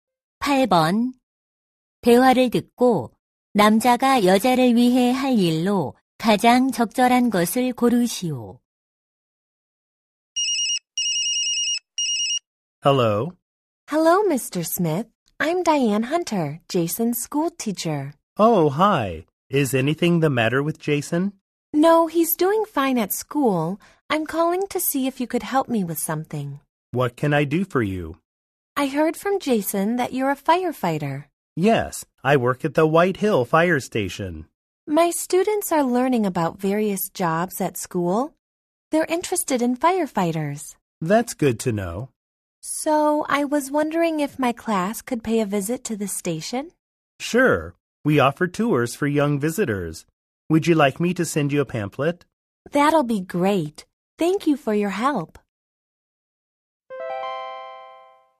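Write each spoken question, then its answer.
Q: 대화를 듣고 남자가 여자를 위해 할 일로 가장 적절한 것을 고르시오.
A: 소방서 견학 안내 팸플릿 보내기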